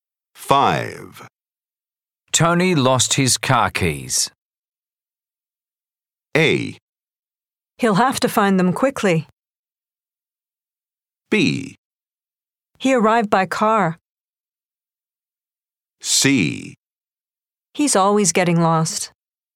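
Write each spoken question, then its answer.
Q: Tony lost his car keys.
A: A: He'll have to find them quickly.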